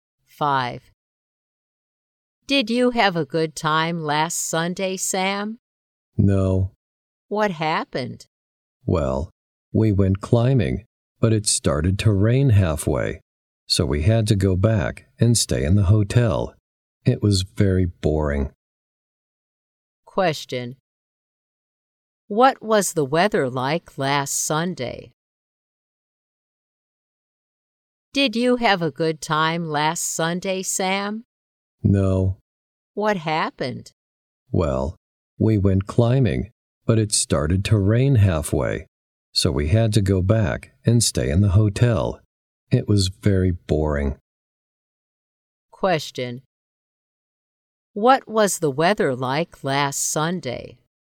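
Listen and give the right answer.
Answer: Rainy.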